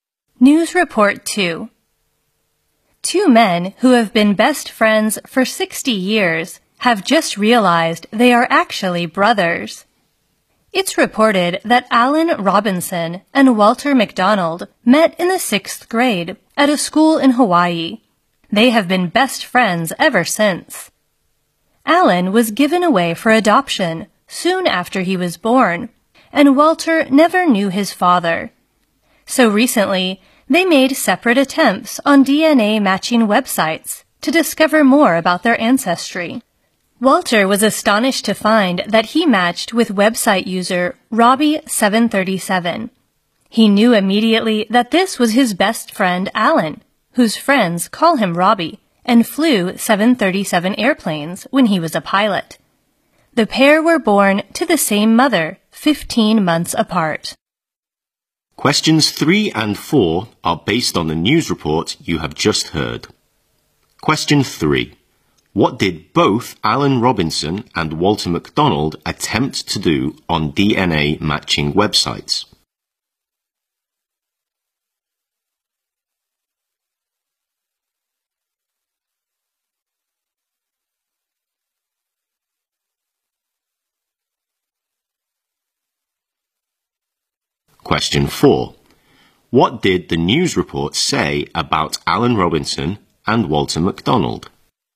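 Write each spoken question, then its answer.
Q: What did both Alan Robinson and Walter McDonald attempt to do on DNA matching websites?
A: Find out more about their ancestry.

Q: What did the news report say about Alan Robinson and Walter McDonald?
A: They were best friends for 60 years and turned out to be brothers born to the same mother.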